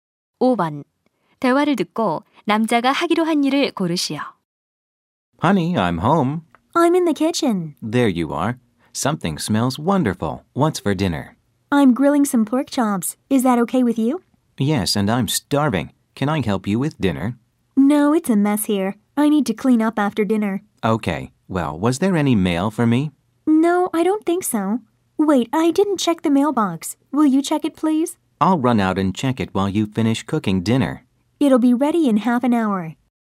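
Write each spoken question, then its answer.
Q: 대화를 듣고 남자가 하기로 한 일을 고르시오.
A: 우편함 확인하기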